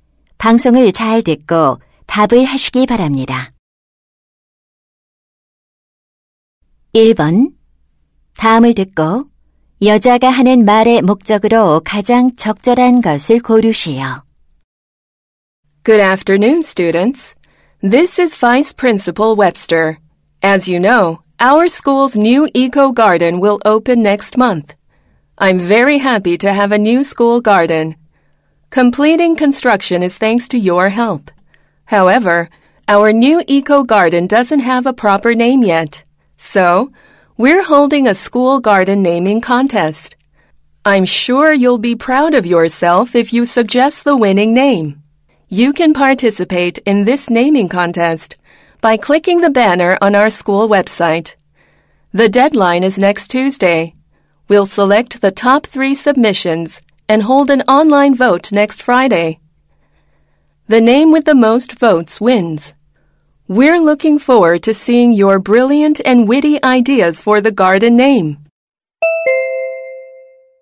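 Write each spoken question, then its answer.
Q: 다음을 듣고 여자가 하는 말의 목적으로 가장 적절한 것을 고르시오.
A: 학교 정원 이름 짓기 대회 참가를 독려하려고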